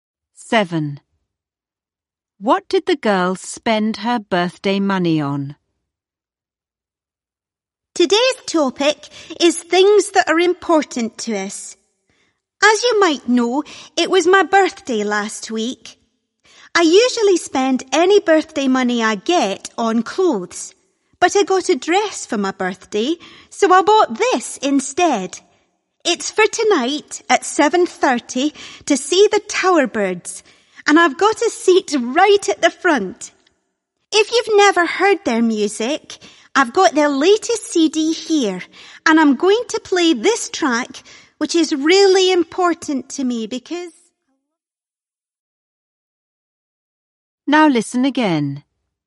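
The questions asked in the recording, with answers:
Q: What did the girl spend her birthday money on?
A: A concert ticket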